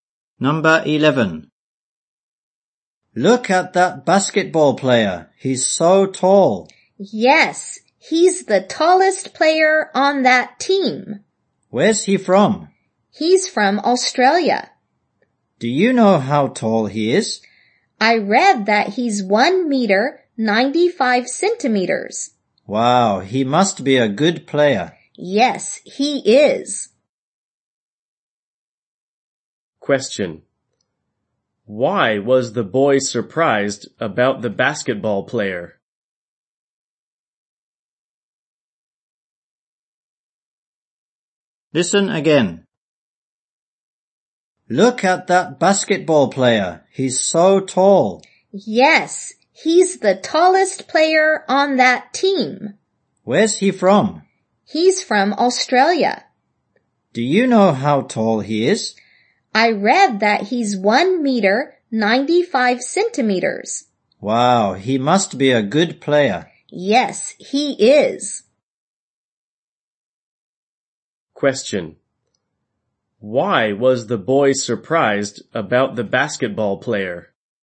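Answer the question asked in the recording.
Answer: Because he is very tall (1 meter 95 centimeters).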